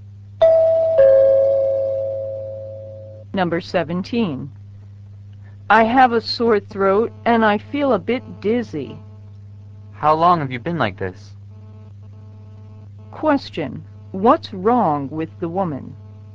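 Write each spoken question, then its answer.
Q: What's wrong with the woman?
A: She has a sore throat and feels dizzy.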